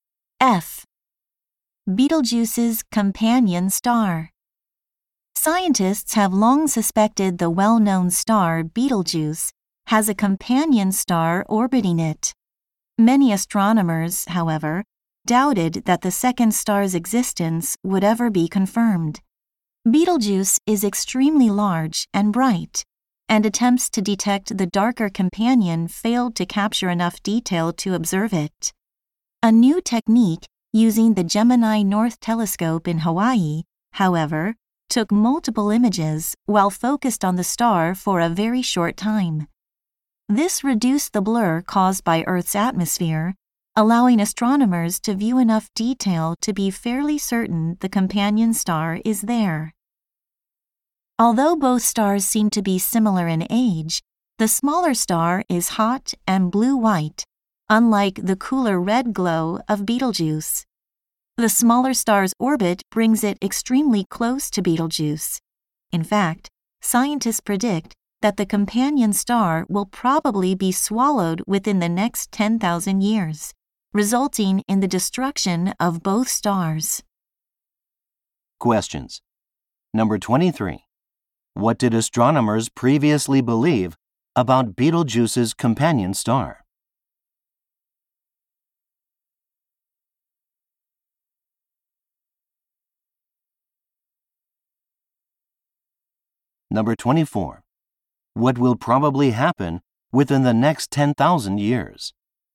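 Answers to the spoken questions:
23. Its existence would never be confirmed
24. Betelgeuse will swallow the companion star, destroying both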